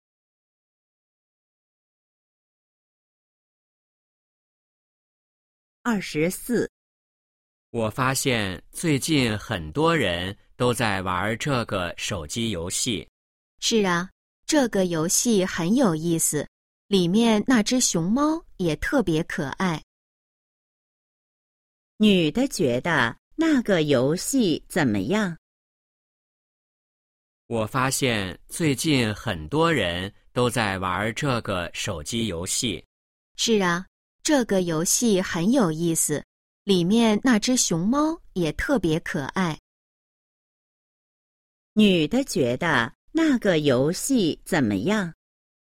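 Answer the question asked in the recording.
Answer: 很有意思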